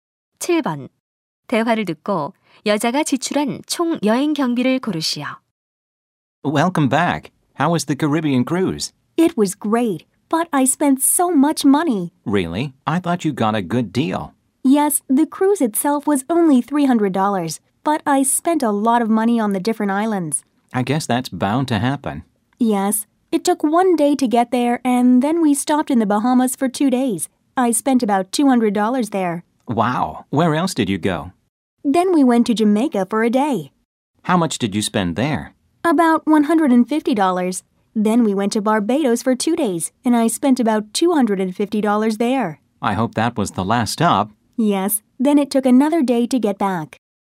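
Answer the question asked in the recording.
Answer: 900달러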